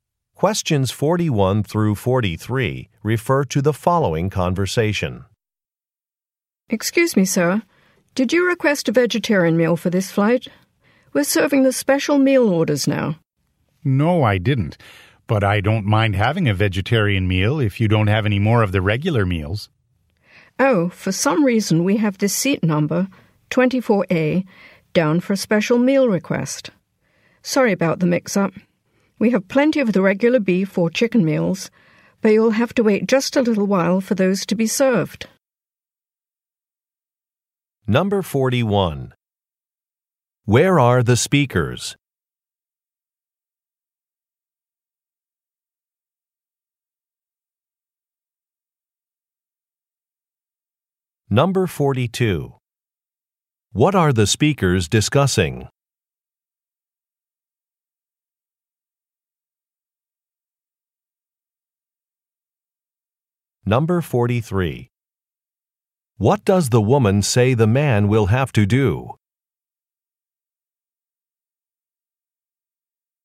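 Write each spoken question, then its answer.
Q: Where are the speakers?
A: On an airplane

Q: What are the speakers discussing?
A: A meal order (vegetarian meal mix-up)

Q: What does the woman say the man will have to do?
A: Wait a little while for a regular meal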